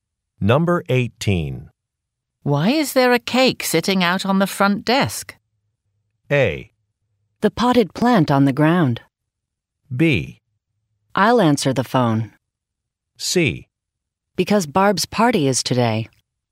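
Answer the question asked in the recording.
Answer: C: Because Barb's party is today.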